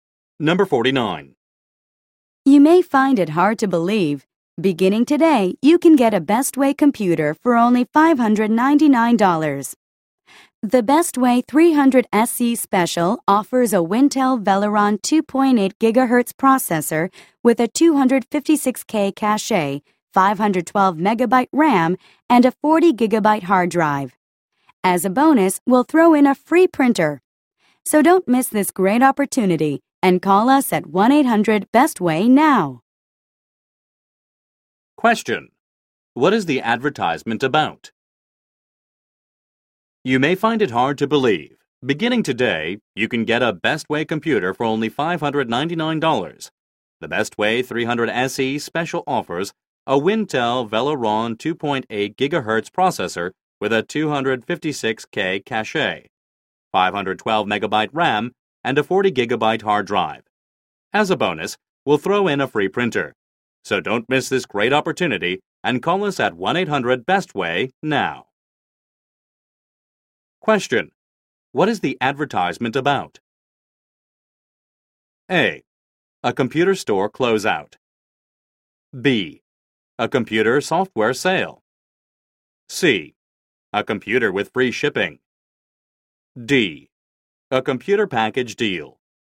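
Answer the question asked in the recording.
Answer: D: A computer package deal.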